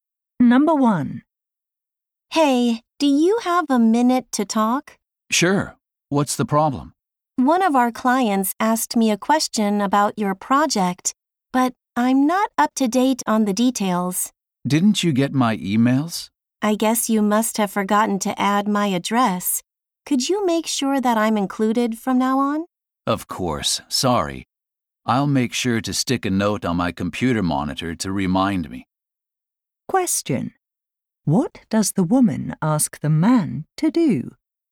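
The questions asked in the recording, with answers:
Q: What does the woman ask the man to do?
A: Include her in his emails from now on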